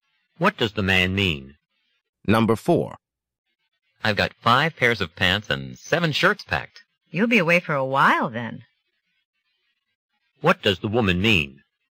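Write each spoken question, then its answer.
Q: What does the woman mean?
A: The man will be away for a long time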